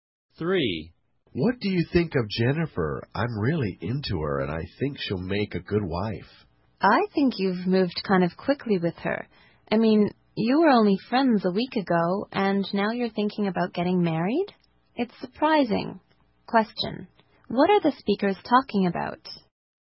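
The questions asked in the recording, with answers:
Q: What are the speakers talking about?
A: The man wanting to marry Jennifer, who was only his friend a week ago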